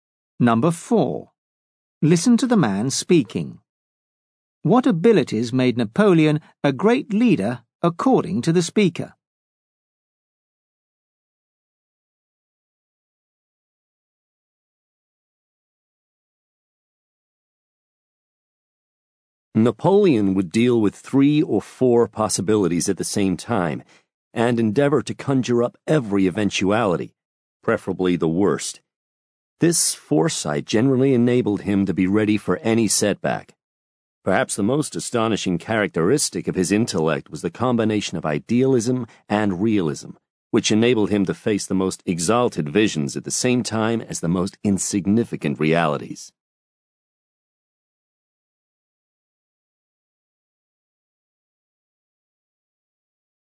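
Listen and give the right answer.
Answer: Foresight and combining idealism with realism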